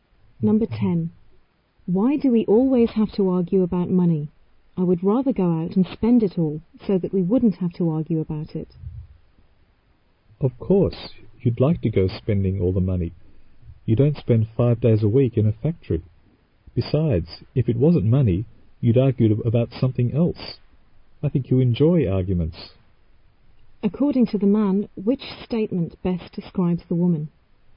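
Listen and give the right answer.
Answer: She enjoys arguing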